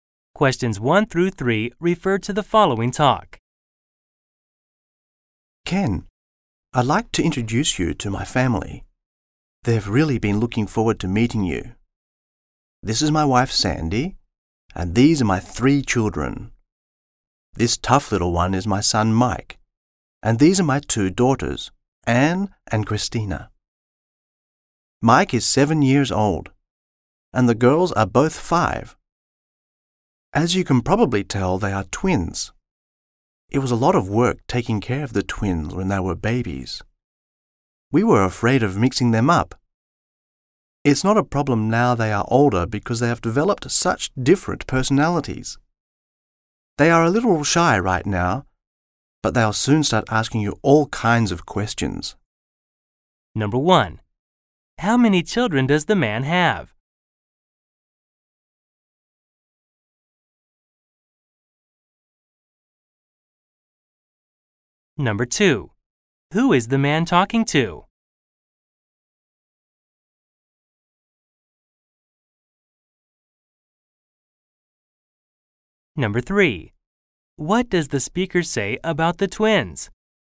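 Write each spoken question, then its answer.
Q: How many children does the man have?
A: Three

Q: Who is the man talking to?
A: Ken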